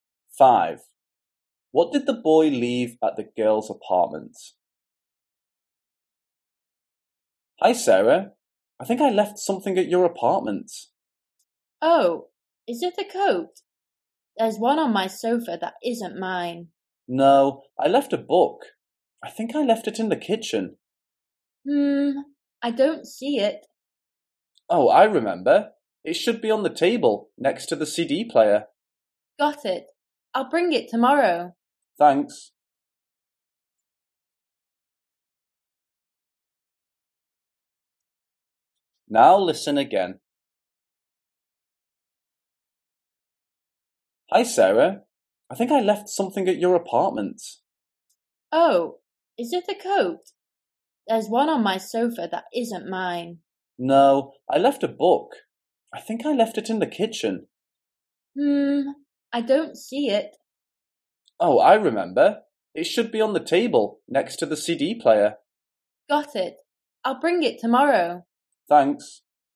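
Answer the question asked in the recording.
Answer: a book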